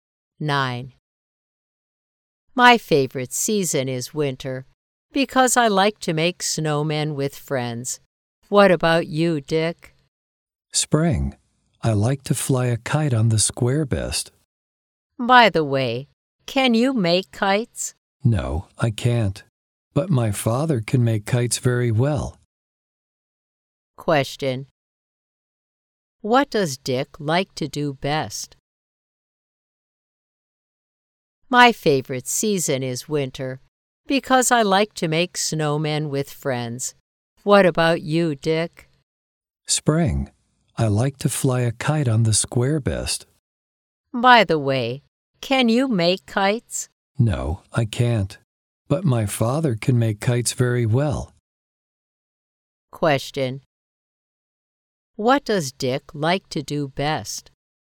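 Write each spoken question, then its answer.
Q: What does Dick like to do best?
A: Fly a kite on the square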